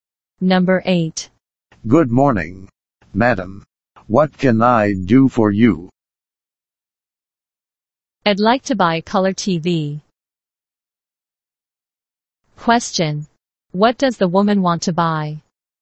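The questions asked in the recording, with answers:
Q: What does the woman want to buy?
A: A color TV.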